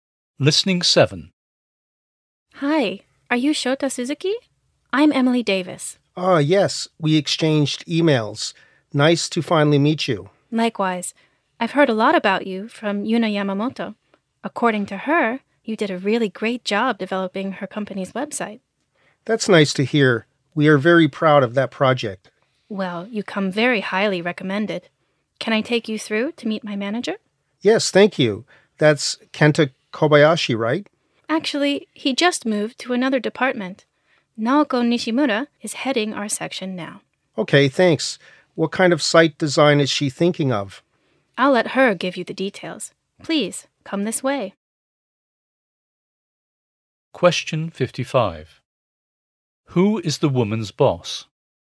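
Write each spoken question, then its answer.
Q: Who is the woman's boss?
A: Naoko Nishimura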